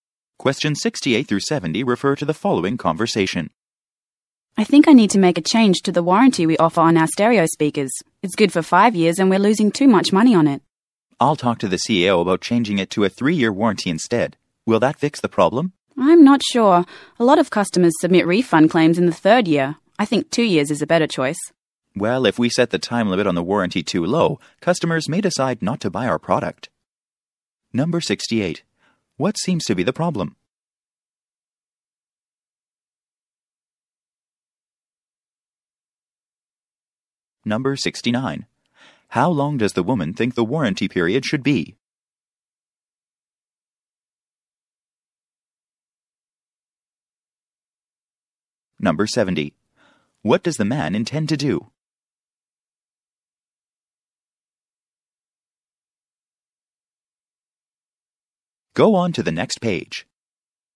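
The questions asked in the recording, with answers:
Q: What seems to be the problem?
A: They are losing too much money on the 5-year warranty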